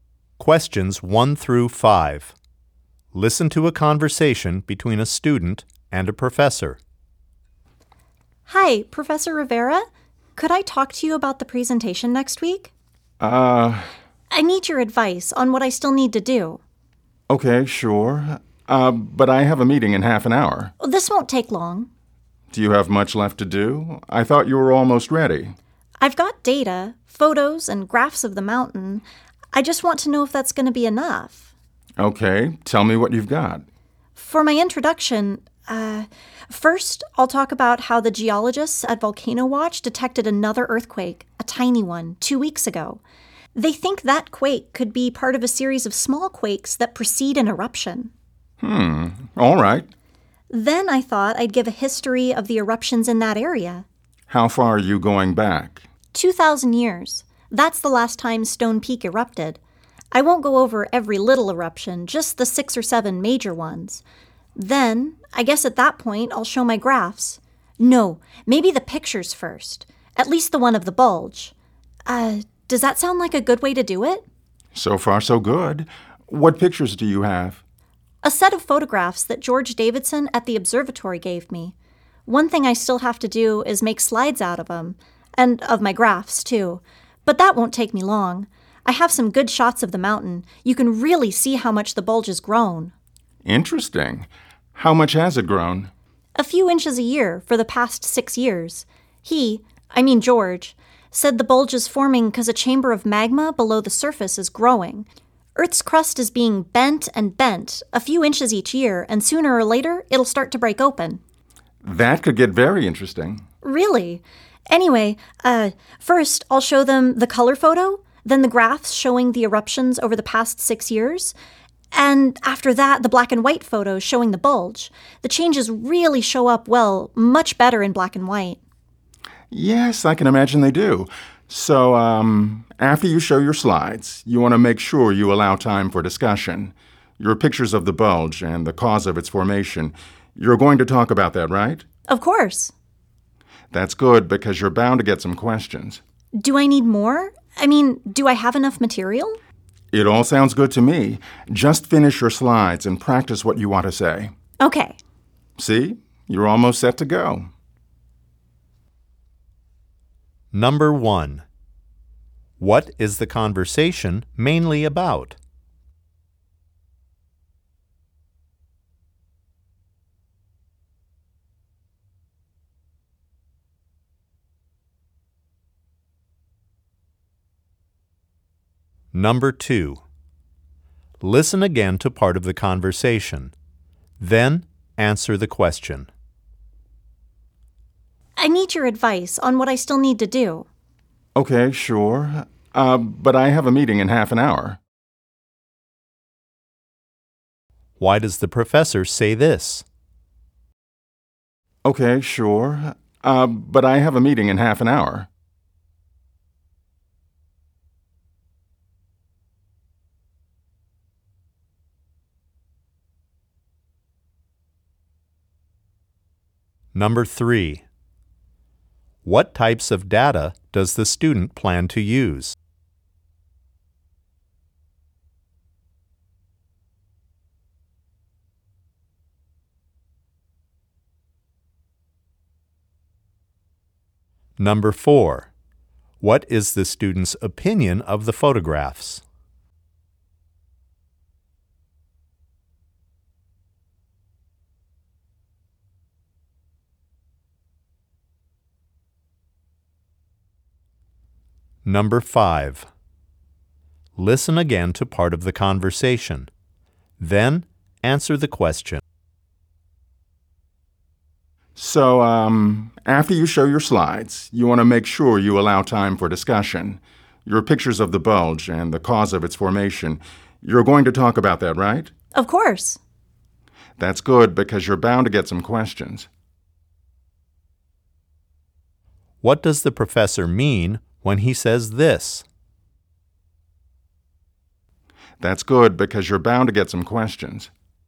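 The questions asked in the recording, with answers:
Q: What is the conversation mainly about?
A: The student's plans for his upcoming presentation on Stone Peak volcano

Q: Why does the professor say this?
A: To let the student know she has only limited time to talk

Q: What is the student's opinion of the photographs?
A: The black and white photo shows the bulge's changes much better

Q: What does the professor mean when he says this?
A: The audience will likely ask about the bulge and its cause, so the student should be prepared to discuss it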